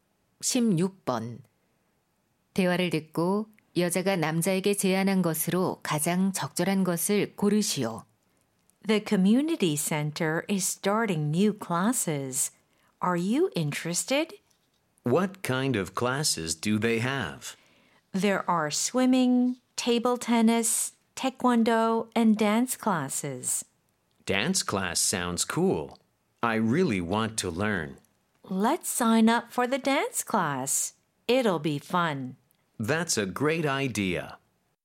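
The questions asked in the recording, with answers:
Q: 대화를 듣고 여자가 남자에게 제안한 것으로 가장 적절한 것을 고르시오.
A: 댄스 수업에 함께 등록하기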